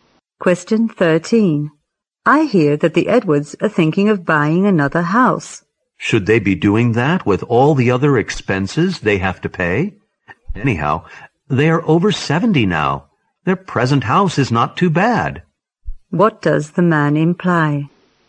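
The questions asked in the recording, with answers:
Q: What does the man imply?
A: The Edwards shouldn't buy another house.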